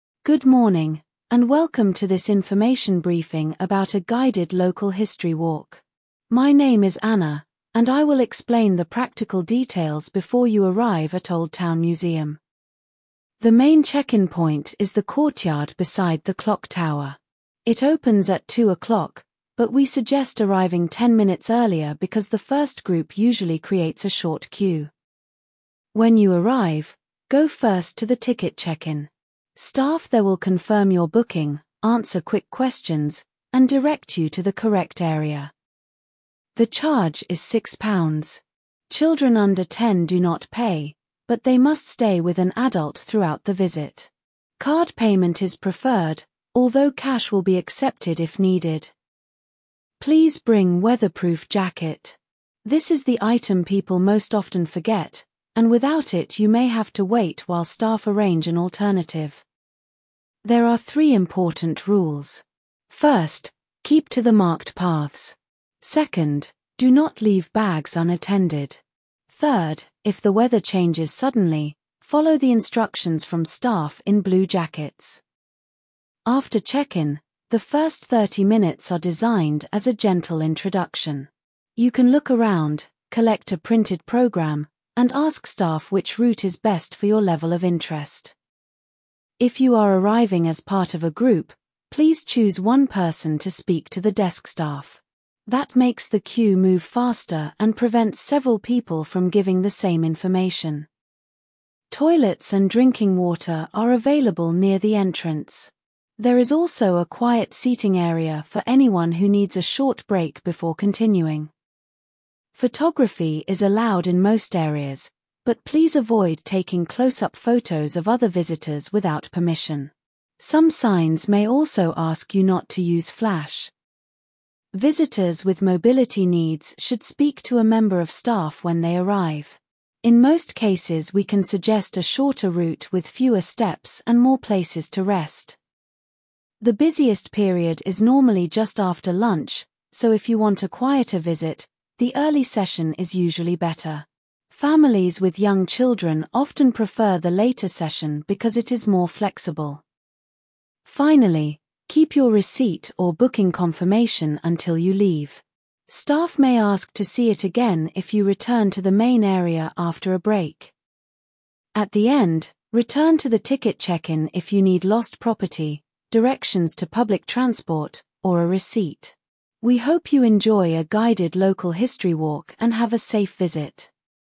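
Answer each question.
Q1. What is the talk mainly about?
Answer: A guided local history walk

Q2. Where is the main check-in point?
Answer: The courtyard beside the clock tower

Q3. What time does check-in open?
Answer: Two o'clock

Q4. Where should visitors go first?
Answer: Ticket check-in

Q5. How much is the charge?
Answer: Six pounds

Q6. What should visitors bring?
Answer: Weatherproof jacket

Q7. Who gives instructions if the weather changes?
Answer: Staff in blue jackets

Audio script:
Good morning, and welcome to this information briefing about a guided local history walk. My name is Anna, and I will explain the practical details before you arrive at Old Town Museum.
The main check-in point is the courtyard beside the clock tower. It opens at two o'clock, but we suggest arriving ten minutes earlier because the first group usually creates a short queue.
When you arrive, go first to the ticket check-in. 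Staff there will confirm your booking, answer quick questions, and direct you to the correct area.
The charge is six pounds. Children under ten do not pay, but they must stay with an adult throughout the visit. Card payment is preferred, although cash will be accepted if needed.
Please bring weatherproof jacket. This is the item people most often forget, and without it you may have to wait while staff arrange an alternative.
There are three important rules. First, keep to the marked paths. Second, do not leave bags unattended. Third, if the weather changes suddenly, follow the instructions from staff in blue jackets.
After check-in, the first thirty minutes are designed as a gentle introduction. You can look around, collect a printed programme, and ask staff which route is best for your level of interest.
If you are arriving as part of a group, please choose one person to speak to the desk staff. 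That makes the queue move faster and prevents several people from giving the same information.
Toilets and drinking water are available near the entrance. There is also a quiet seating area for anyone who needs a short break before continuing.
Photography is allowed in most areas, but please avoid taking close-up photos of other visitors without permission. Some signs may also ask you not to use flash.
Visitors with mobility needs should speak to a member of staff when they arrive. In most cases we can suggest a shorter route with fewer steps and more places to rest.
The busiest period is normally just after lunch, so if you want a quieter visit, the early session is usually better. Families with young children often prefer the later session because it is more flexible.
Finally, keep your receipt or booking confirmation until you leave. Staff may ask to see it again if you return to the main area after a break.
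At the end, return to the ticket check-in if you need lost property, directions to public transport, or a receipt. We hope you enjoy a guided local history walk and have a safe visit.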